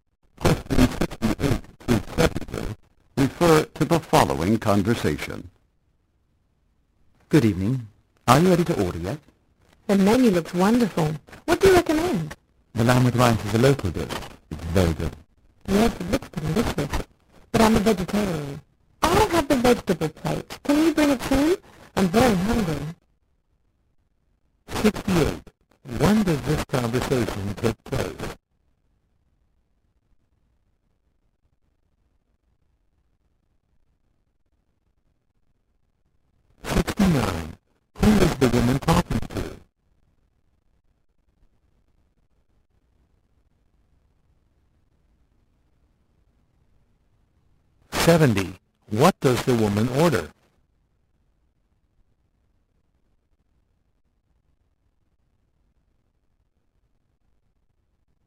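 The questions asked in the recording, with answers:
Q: When does this conversation take place?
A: In the evening

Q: Who is the woman talking to?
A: A waiter

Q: What does the woman order?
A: The vegetable plate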